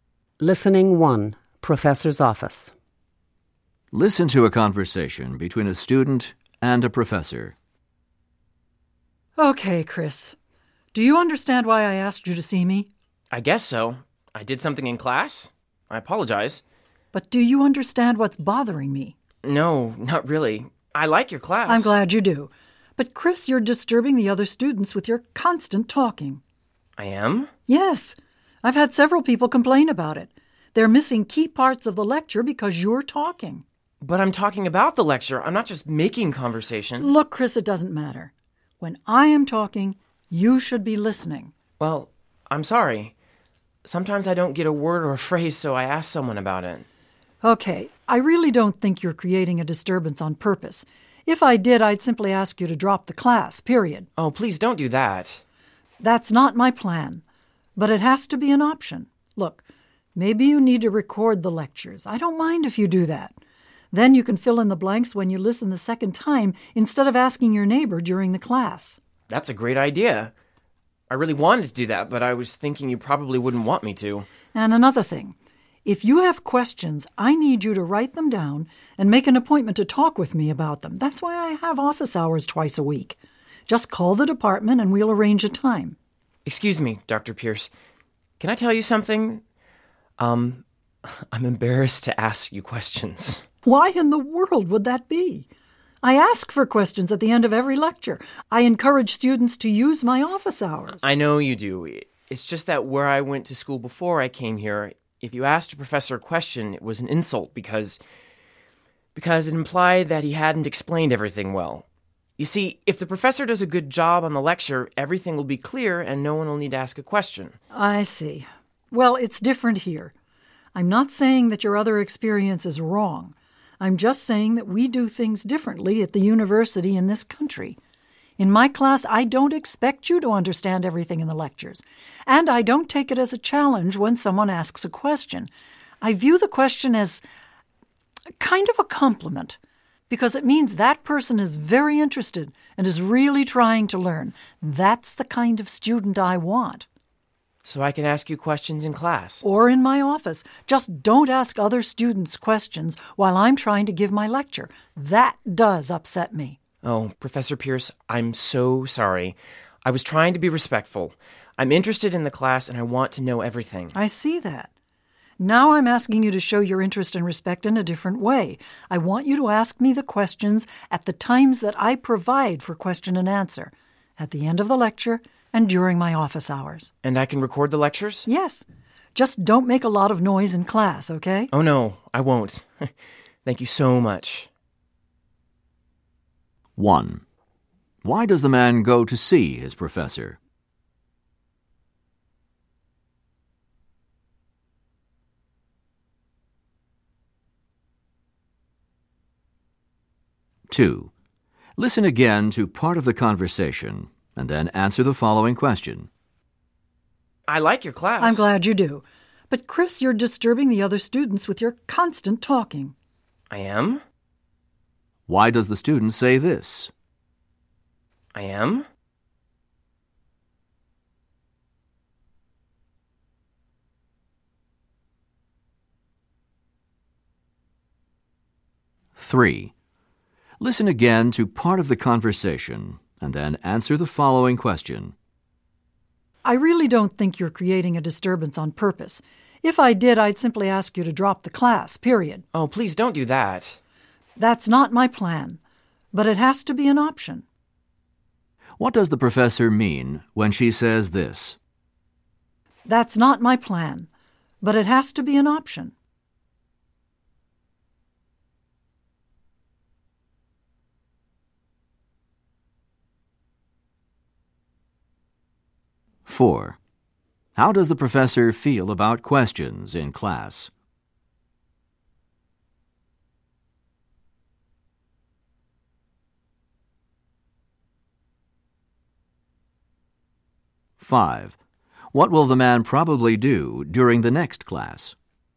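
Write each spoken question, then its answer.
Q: Why does the man go to see his professor?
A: The professor asked to see him because his talking in class disturbs other students

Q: How does the professor feel about questions in class?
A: She welcomes them as a compliment showing interest

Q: What will the man probably do during the next class?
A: Record the lecture and not talk to other students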